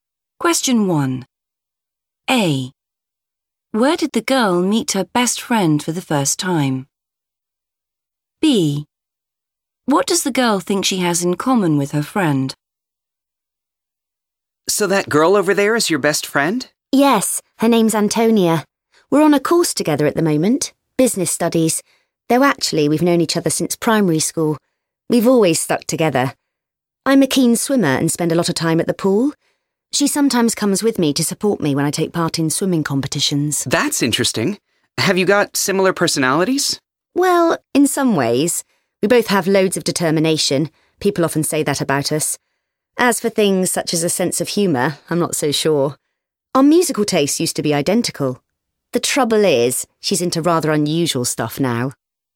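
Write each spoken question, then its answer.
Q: Where did the girl meet her best friend for the first time?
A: at primary school

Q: What does the girl think she has in common with her friend?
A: determination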